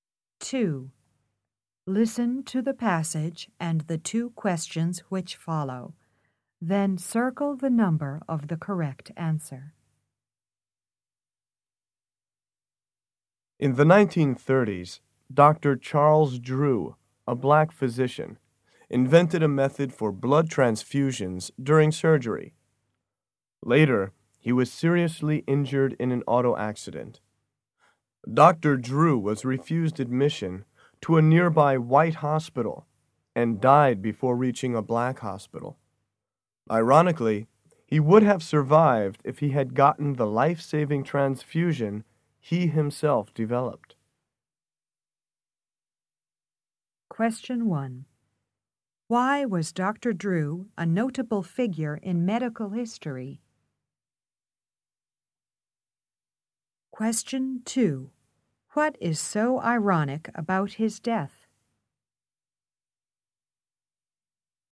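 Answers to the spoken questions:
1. He invented a method for blood transfusions during surgery
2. He died for lack of the blood transfusion method he himself developed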